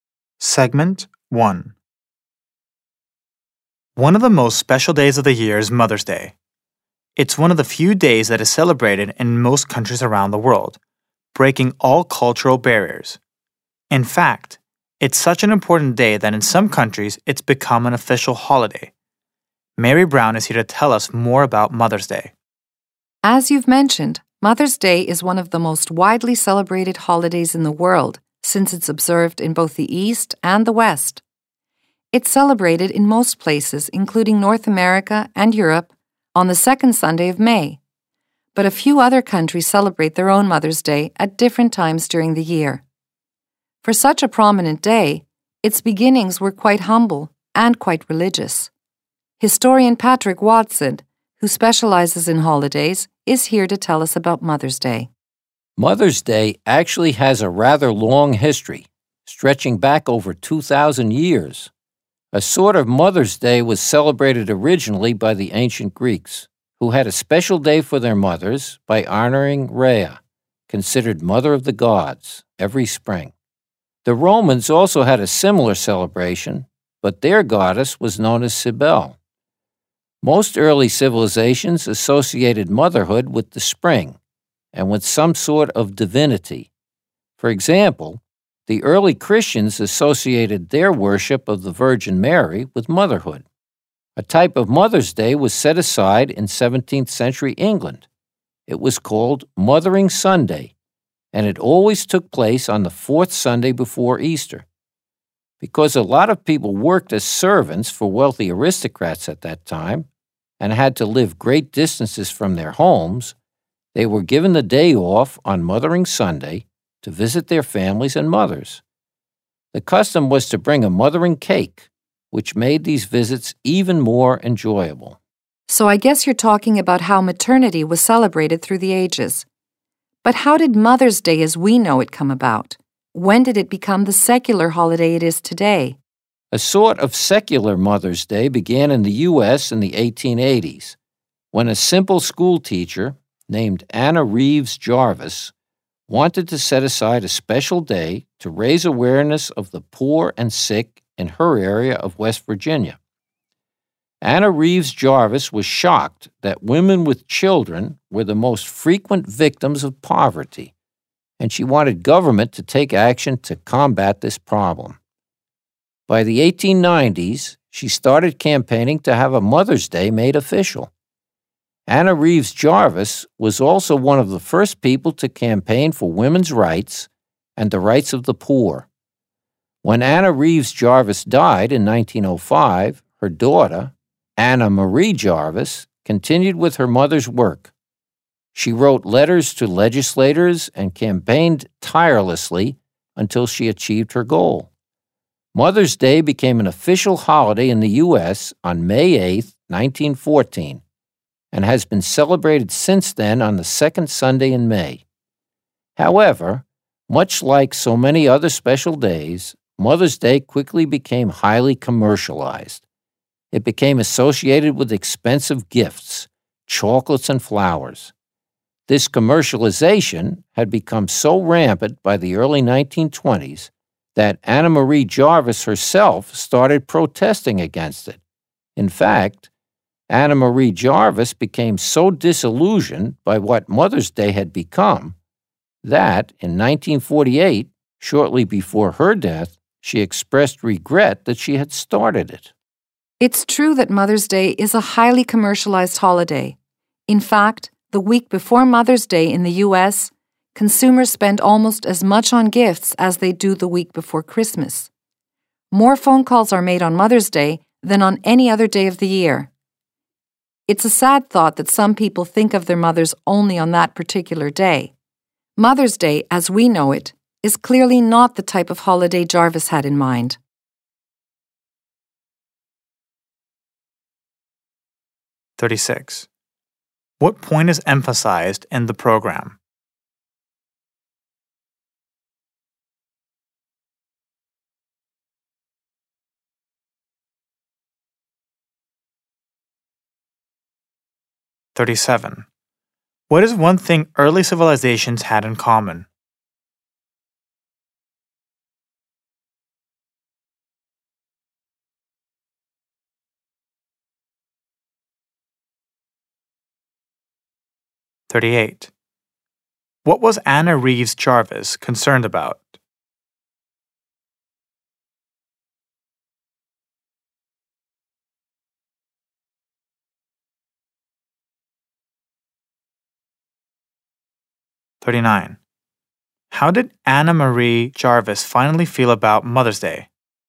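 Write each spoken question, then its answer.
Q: What is one thing early civilizations had in common?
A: They linked motherhood with spring and a divinity

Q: What was Anna Reeves Jarvis concerned about?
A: Poverty and sickness, especially among mothers, in her area

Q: How did Anna Marie Jarvis finally feel about Mother's Day?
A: Disillusioned; she regretted starting it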